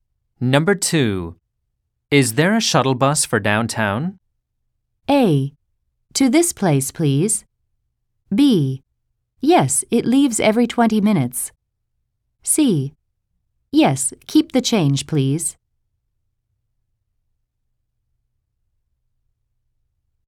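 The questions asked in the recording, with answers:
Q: Is there a shuttle bus for downtown?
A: B: Yes, it leaves every 20 minutes.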